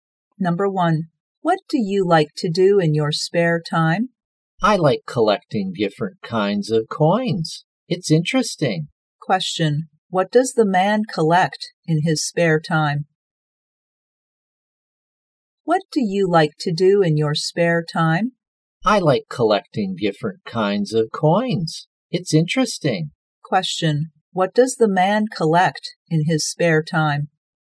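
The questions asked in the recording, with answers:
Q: what does the man collect in his spare time?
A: Coins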